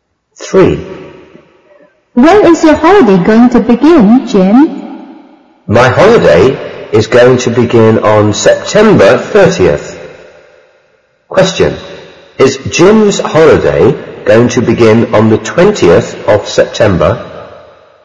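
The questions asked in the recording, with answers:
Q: Is Jim's holiday going to begin on the 20th of September?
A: No, it's going to begin on September 30th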